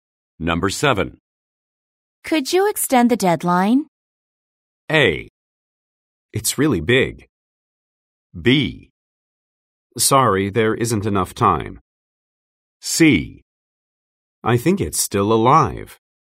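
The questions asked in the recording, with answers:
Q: Could you extend the deadline?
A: B: Sorry, there isn't enough time.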